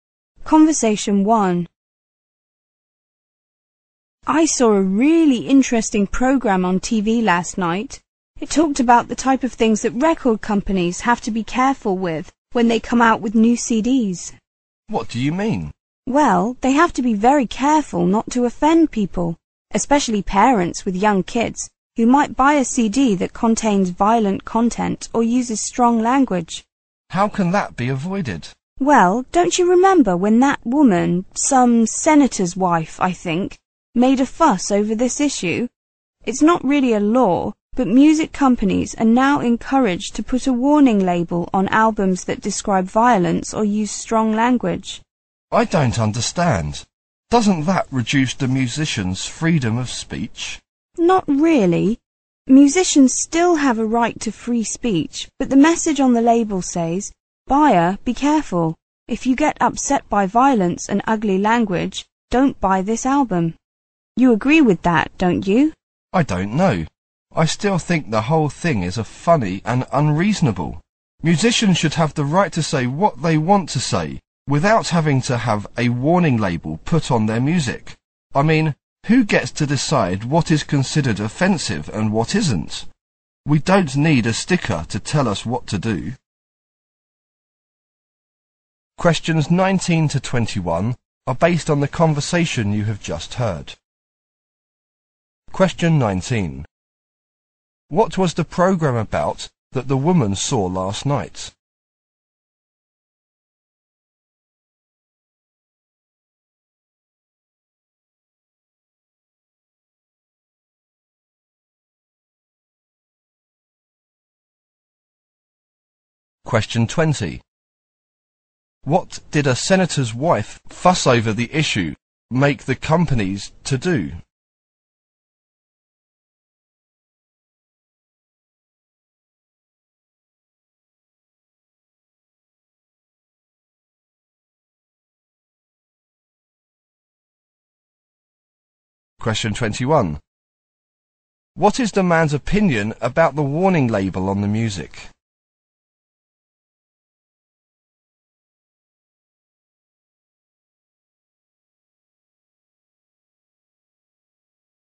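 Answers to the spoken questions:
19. Things record companies must be careful with when releasing new CDs, such as not offending people with violent content or strong language
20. Put warning labels on albums with violence or strong language
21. He thinks it is funny and unreasonable; musicians should say what they want without labels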